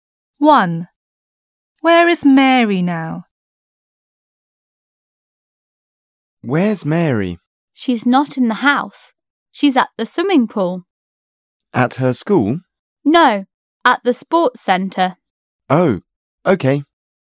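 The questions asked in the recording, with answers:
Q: Where is Mary now?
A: At the swimming pool at the sports centre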